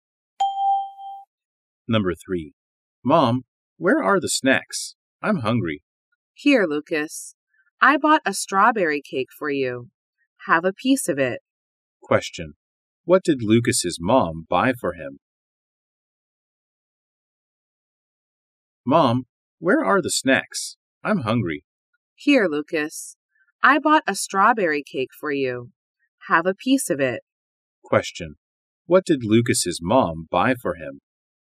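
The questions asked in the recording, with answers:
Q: What did Lucas's mom buy for him?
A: A strawberry cake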